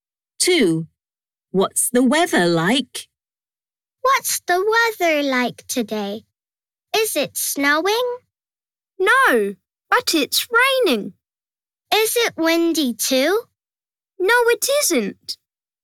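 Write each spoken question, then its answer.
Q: What's the weather like?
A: It's raining.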